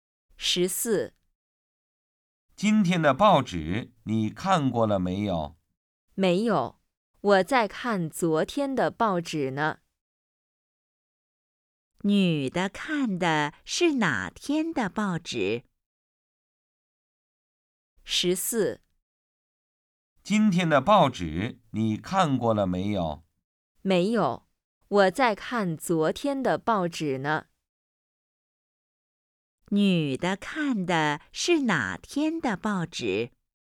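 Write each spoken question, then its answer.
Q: 女的看的是哪天的报纸?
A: 昨天的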